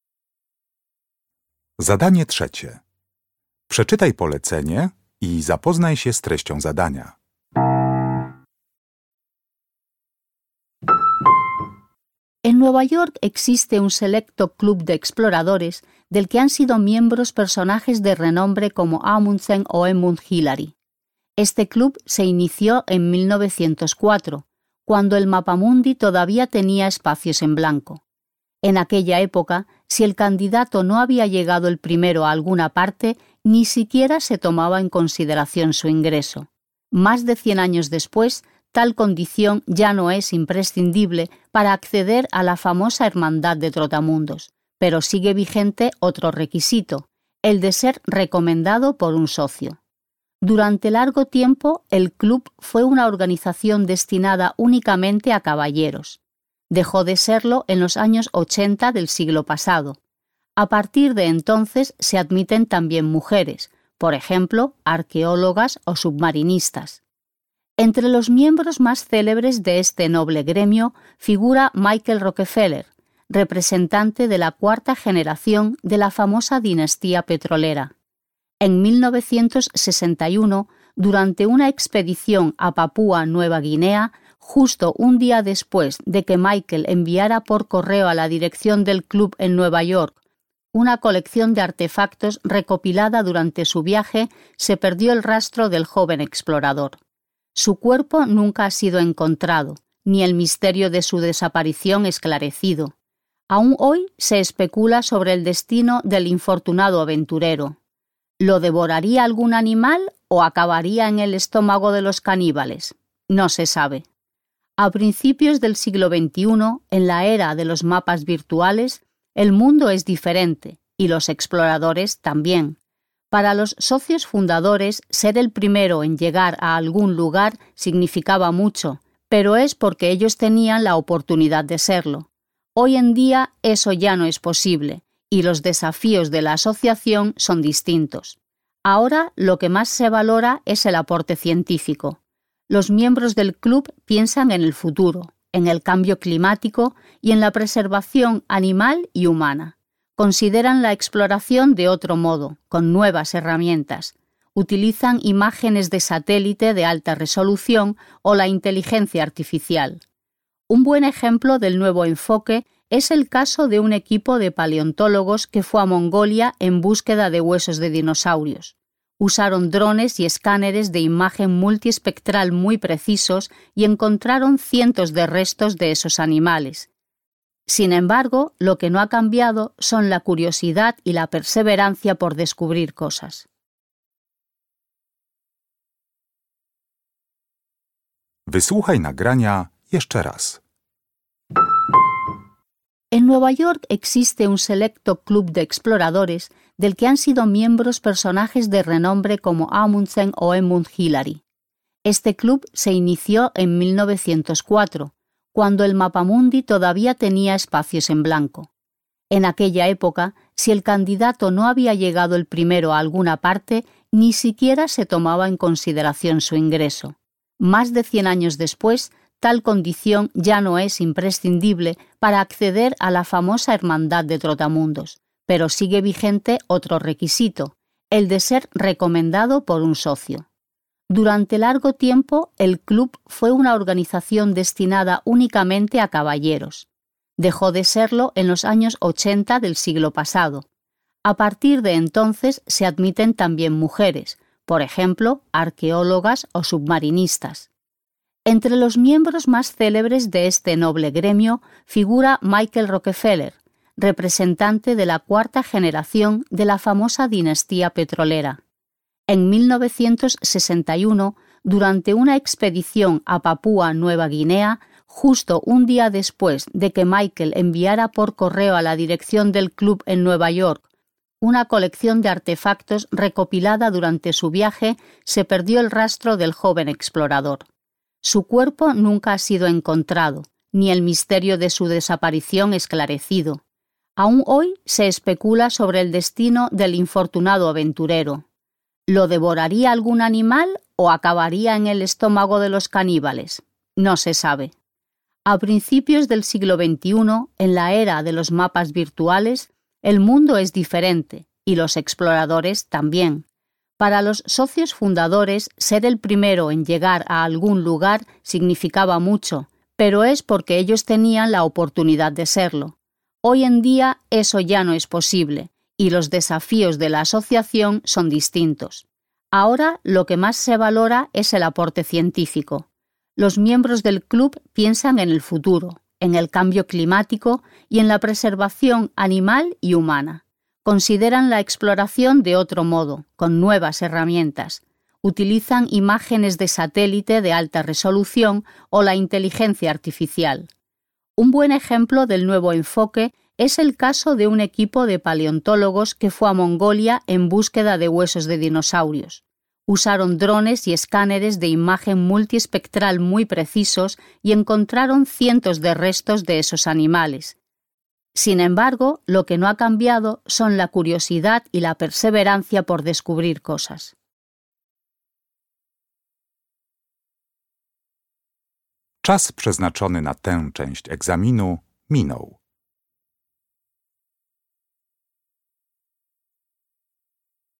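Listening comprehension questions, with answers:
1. Hoy en día, para ser miembro del club en cuestión sigue siendo indispensable .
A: ser recomendado por un socio

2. Todavía entre los miembros del club se discuten las circunstancias de cómo Michael Rockefeller.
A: desapareció

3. Puesto que ya no hay , los actuales miembros del club centran su labor en cuestiones medioambientales e investigaciones científicas.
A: lugares a los que llegar por primera vez

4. El equipo de científicos citado en el texto pudo localizar gracias al uso de las nuevas tecnologías.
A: cientos de restos de dinosaurios

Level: Poziom: rozszerzony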